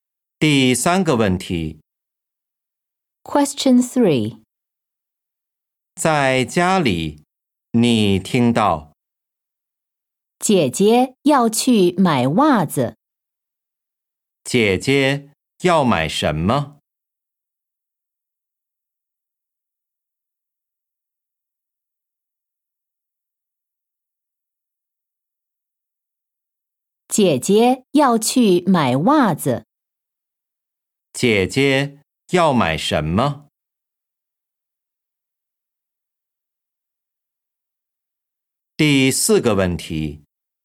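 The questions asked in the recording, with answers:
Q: 姐姐要买什么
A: 袜子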